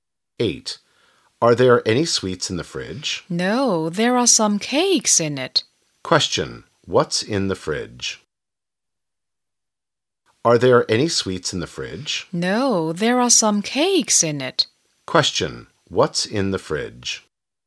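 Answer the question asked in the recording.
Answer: Some cakes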